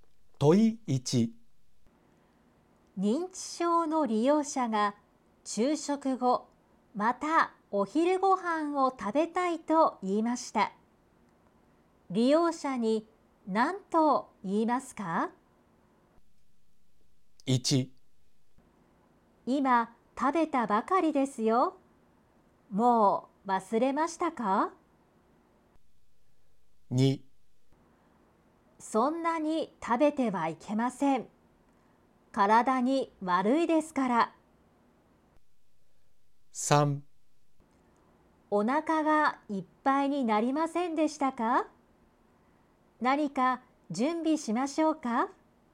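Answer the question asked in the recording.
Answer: 3: お腹がいっぱいになりませんでしたか?何か準備しましょうか?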